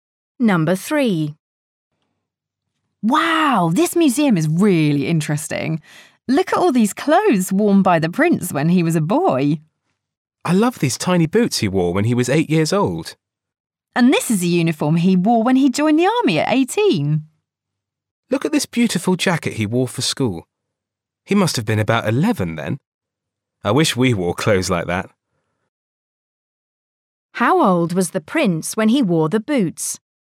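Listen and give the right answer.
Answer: 8 years old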